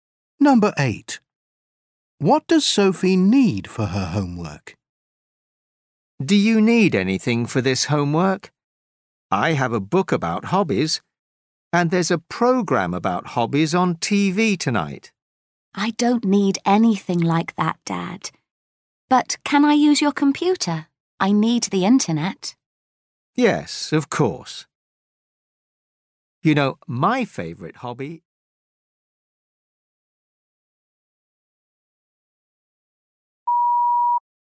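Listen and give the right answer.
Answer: A computer (the internet)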